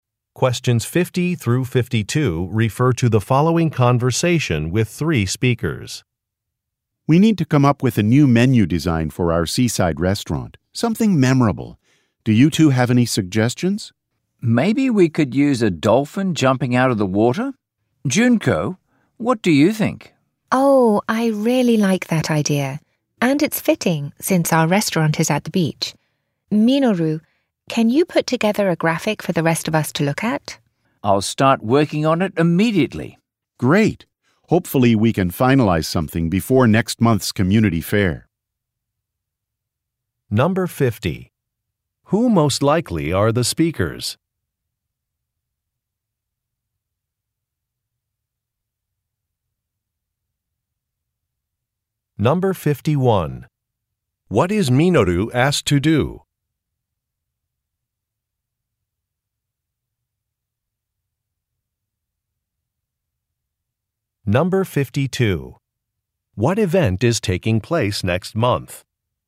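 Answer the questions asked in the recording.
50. Restaurant employees
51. Put together a graphic for the new menu design
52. A community fair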